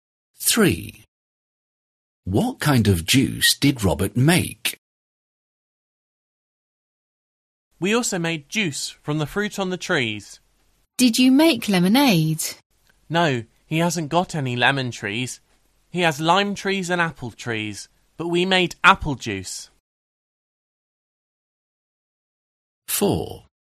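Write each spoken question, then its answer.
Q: What kind of juice did Robert make?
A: apple juice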